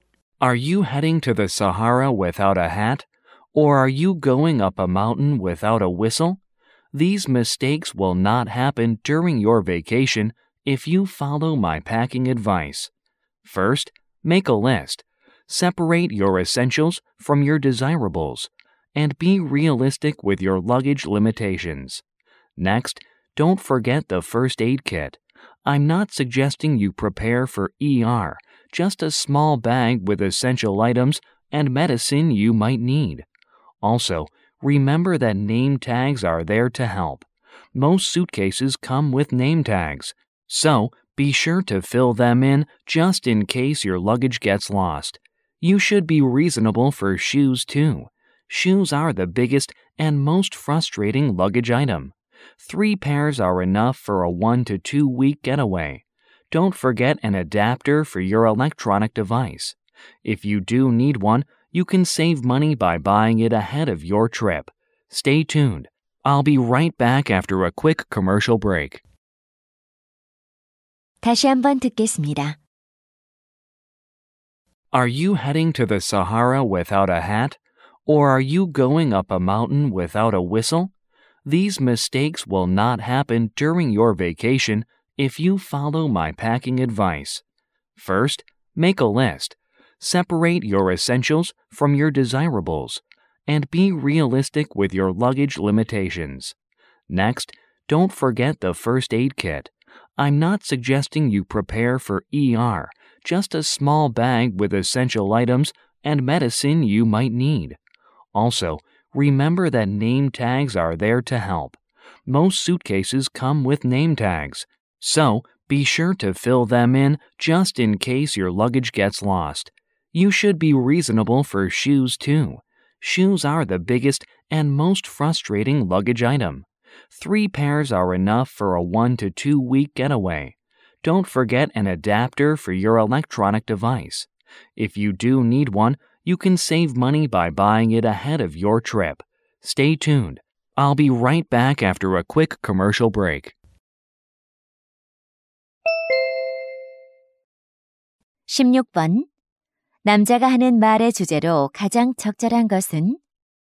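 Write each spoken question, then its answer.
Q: 남자가 하는 말의 주제로 가장 적절한 것은?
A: 여행 짐 싸기 요령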